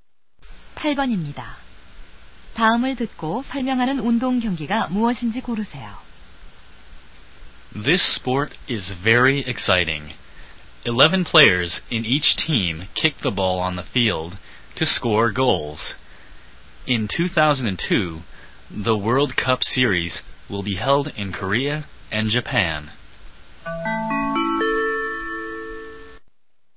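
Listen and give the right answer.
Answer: 축구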